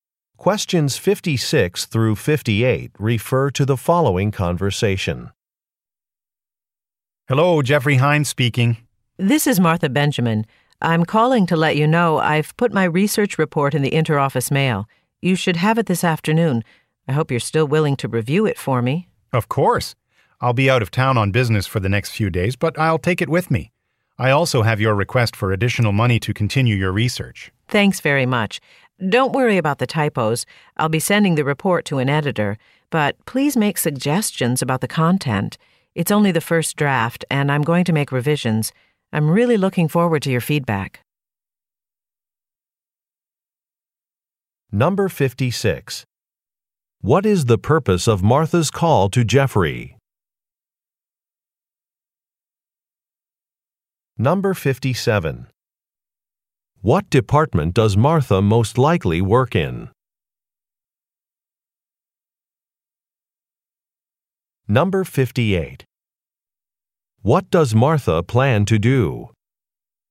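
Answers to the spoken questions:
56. To tell him she has sent her research report for review
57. Research
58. Revise the report and send it to an editor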